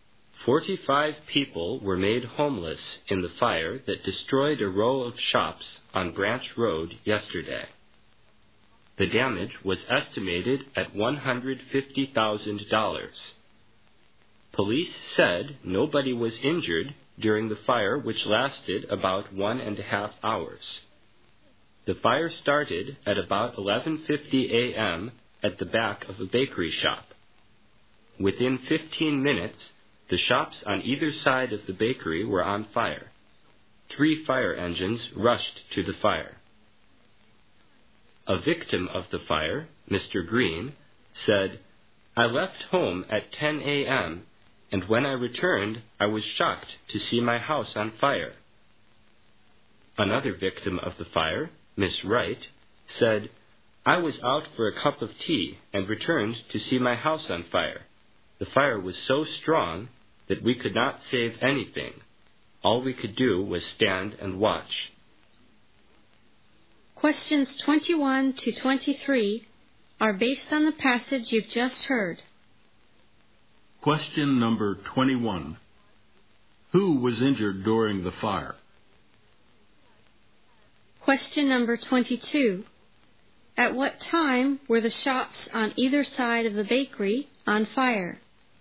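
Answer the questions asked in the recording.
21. Nobody.
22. At about 12:05 p.m.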